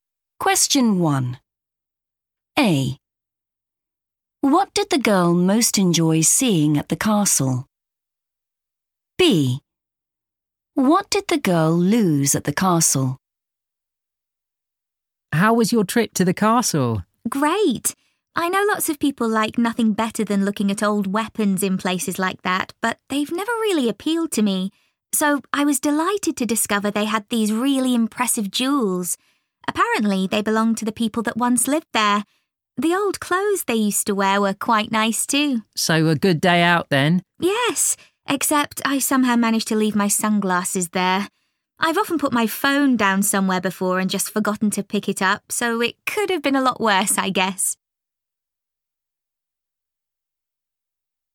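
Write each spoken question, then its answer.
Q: What did the girl most enjoy seeing at the castle?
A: jewels

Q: What did the girl lose at the castle?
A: sunglasses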